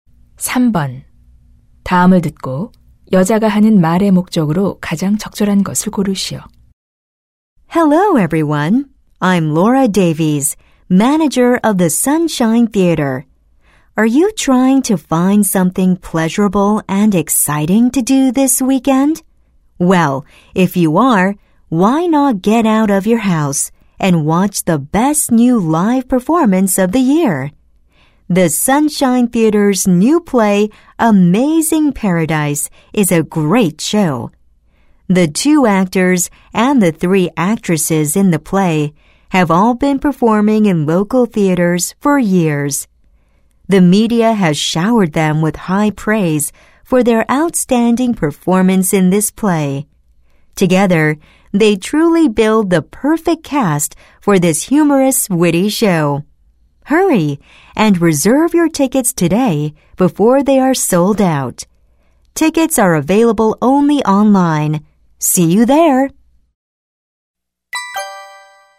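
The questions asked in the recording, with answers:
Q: 다음을 듣고 여자가 하는 말의 목적으로 가장 적절한 것을 고르시오.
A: 새 연극 Amazing Paradise를 홍보하고 예매를 권하려고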